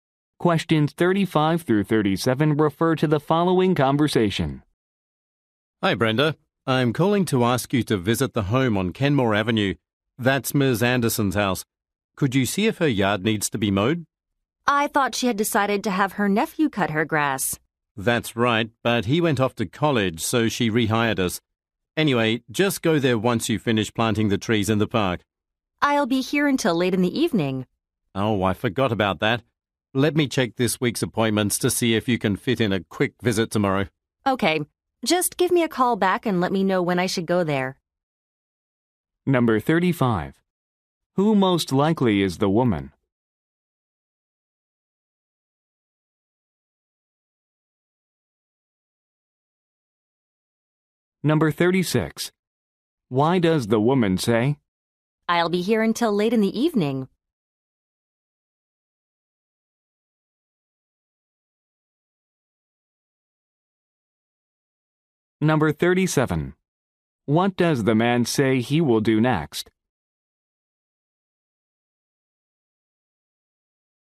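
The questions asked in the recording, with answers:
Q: Who most likely is the woman?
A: A landscaper/gardener.

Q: What does the man say he will do next?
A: Check this week's appointments.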